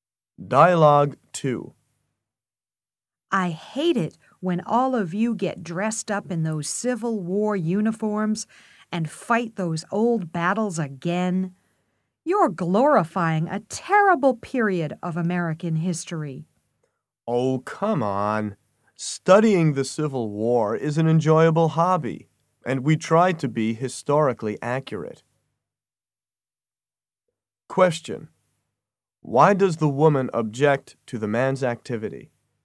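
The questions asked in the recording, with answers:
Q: Why does the woman object to the man's activity?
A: She thinks it glorifies a terrible period of American history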